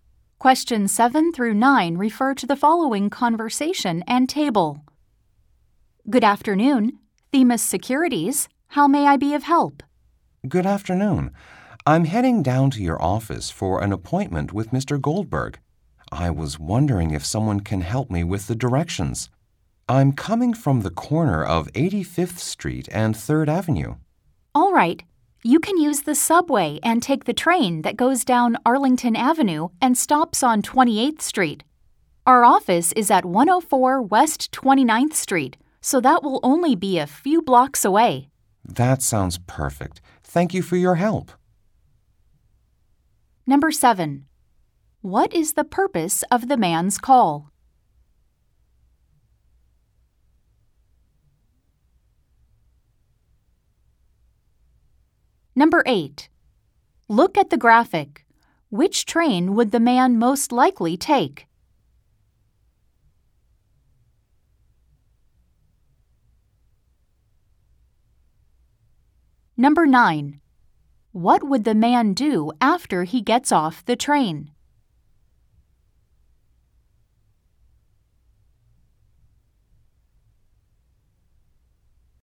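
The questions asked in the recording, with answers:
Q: What is the purpose of the man's call?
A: To ask for directions to the office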